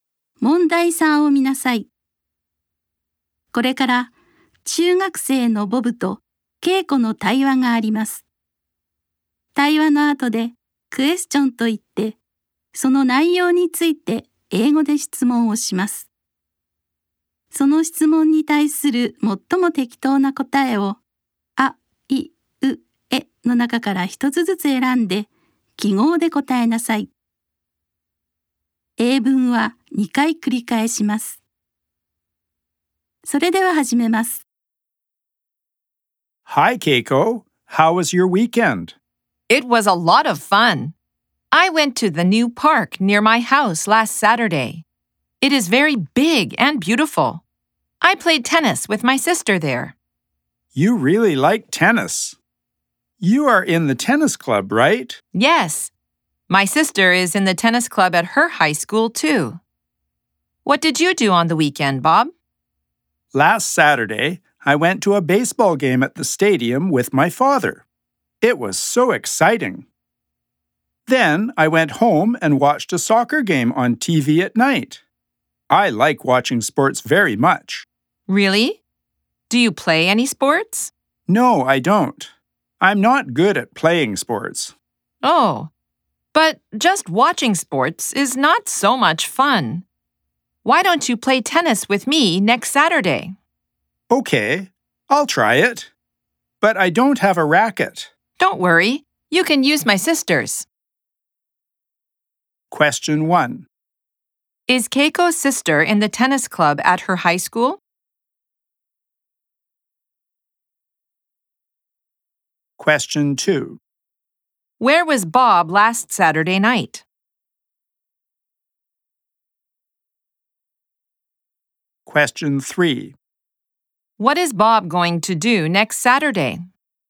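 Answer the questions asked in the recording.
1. Yes, she is.
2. At home (watching a soccer game on TV).
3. Play tennis with Keiko.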